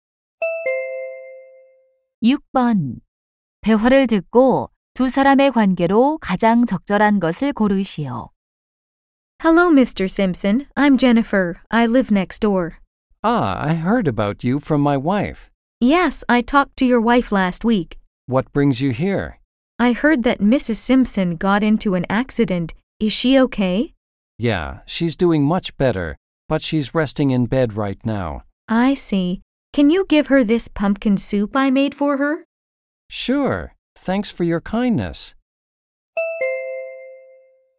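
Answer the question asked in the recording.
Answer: 이웃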